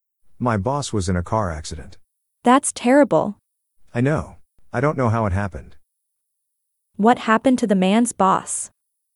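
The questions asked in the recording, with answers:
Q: What happened to the man's boss?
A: He was in a car accident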